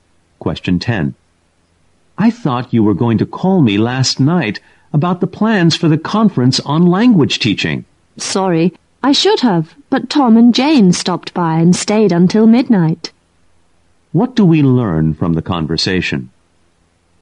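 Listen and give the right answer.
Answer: The speaker didn't call because Tom and Jane visited and stayed until midnight.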